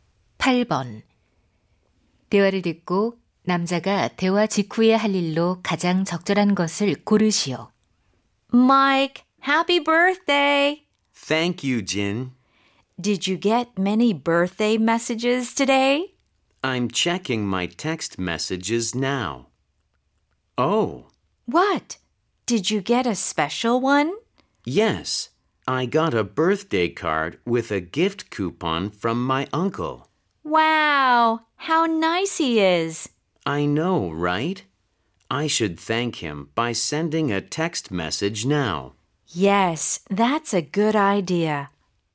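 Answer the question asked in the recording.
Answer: 삼촌에게 감사 문자 보내기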